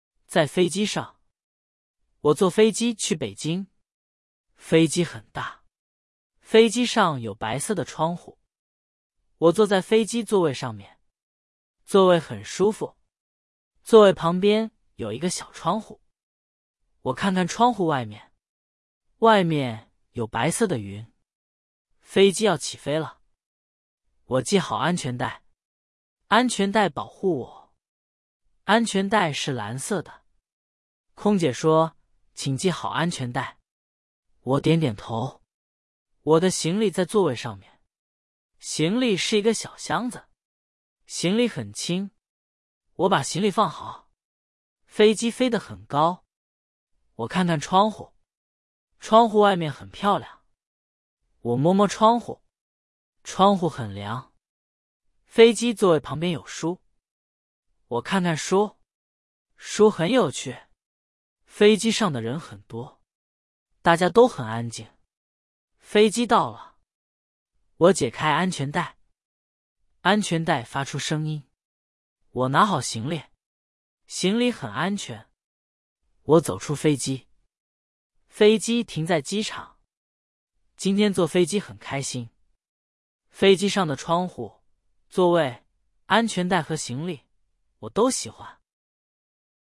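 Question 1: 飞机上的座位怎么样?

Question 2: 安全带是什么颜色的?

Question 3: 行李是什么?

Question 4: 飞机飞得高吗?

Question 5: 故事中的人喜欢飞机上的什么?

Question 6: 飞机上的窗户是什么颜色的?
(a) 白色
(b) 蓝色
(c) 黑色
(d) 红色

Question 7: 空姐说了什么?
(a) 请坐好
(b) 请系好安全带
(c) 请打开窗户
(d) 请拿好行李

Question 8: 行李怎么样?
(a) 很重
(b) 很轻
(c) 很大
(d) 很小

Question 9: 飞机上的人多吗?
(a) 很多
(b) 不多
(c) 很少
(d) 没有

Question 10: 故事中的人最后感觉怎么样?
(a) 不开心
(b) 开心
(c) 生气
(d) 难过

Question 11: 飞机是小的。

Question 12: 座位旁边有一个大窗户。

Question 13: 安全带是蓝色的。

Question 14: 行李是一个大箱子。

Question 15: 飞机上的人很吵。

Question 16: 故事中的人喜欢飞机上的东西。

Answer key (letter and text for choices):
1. 很舒服
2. 蓝色
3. 一个小箱子
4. 很高
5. 窗户、座位、安全带和行李
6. (a) 白色
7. (b) 请系好安全带
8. (b) 很轻
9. (a) 很多
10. (b) 开心
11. 错
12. 错
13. 对
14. 错
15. 错
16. 对

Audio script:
在飞机上
我坐飞机去北京。飞机很大。飞机上有白色的窗户。我坐在飞机座位上面。座位很舒服。座位旁边有一个小窗户。我看看窗户外面。外面有白色的云。
飞机要起飞了。我系好安全带。安全带保护我。安全带是蓝色的。空姐说,请系好安全带。我点点头。我的行李在座位上面。行李是一个小箱子。行李很轻。我把行李放好。
飞机飞得很高。我看看窗户。窗户外面很漂亮。我摸摸窗户。窗户很凉。飞机座位旁边有书。我看看书。书很有趣。飞机上的人很多。大家都很安静。
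飞机到了。我解开安全带。安全带发出声音。我拿好行李。行李很安全。我走出飞机。飞机停在机场。今天坐飞机很开心。飞机上的窗户、座位、安全带和行李,我都喜欢。

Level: Beginner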